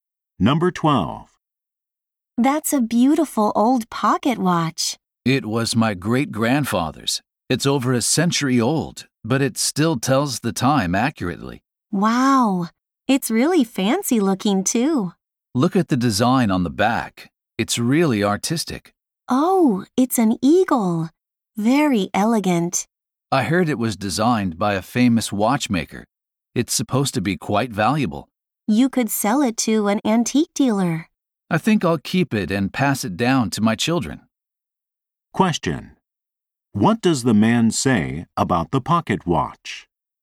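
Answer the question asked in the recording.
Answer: He will keep it and pass it down to his children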